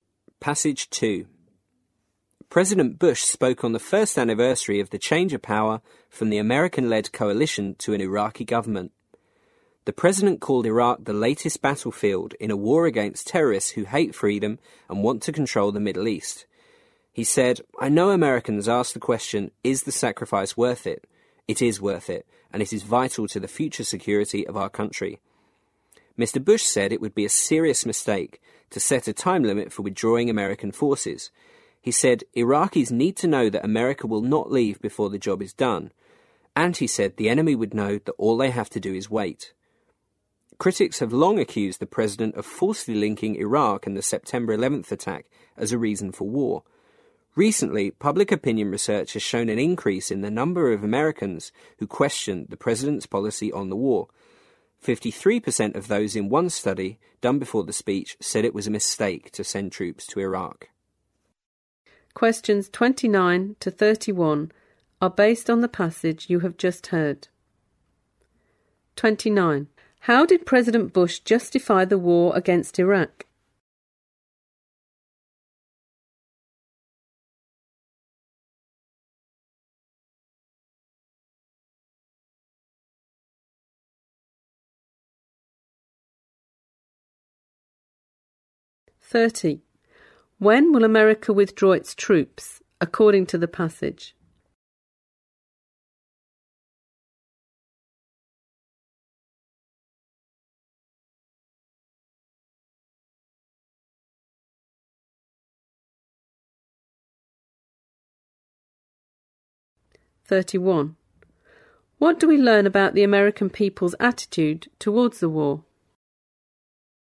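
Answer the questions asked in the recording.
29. He said it is vital to the future security of the US; Iraq is the latest battlefield in the war against terrorists.
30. Not before the job is done.
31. More Americans are questioning the president's war policy; 53% said sending troops was a mistake.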